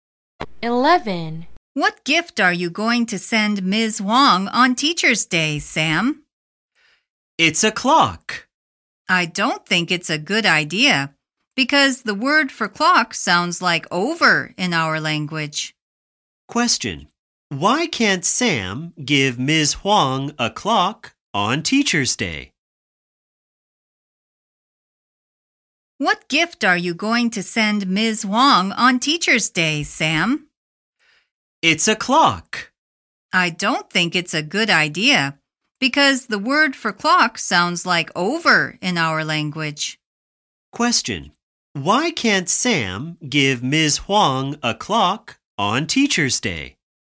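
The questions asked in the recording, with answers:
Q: Why can't Sam give Ms. Wong a clock on Teacher's Day?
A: Because the word for clock sounds like "over" in their language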